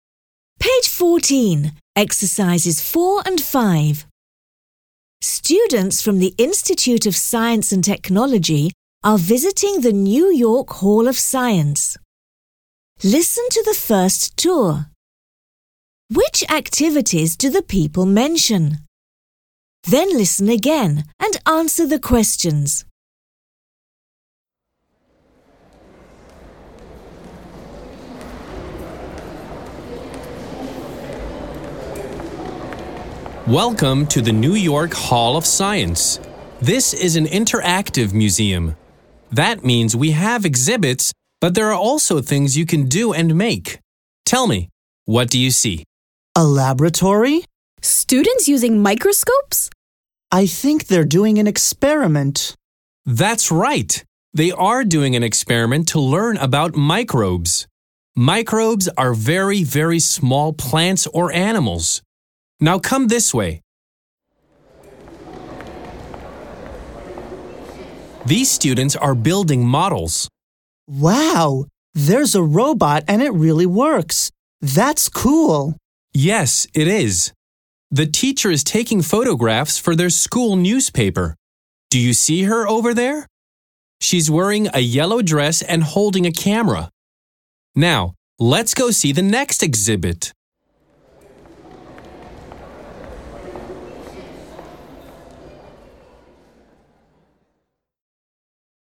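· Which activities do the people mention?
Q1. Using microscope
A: Yes

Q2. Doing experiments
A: Yes

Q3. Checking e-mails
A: No

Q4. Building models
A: Yes

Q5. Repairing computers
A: No

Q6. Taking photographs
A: Yes

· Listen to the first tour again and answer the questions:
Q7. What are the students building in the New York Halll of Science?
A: Models (a robot)

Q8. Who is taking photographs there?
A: The teacher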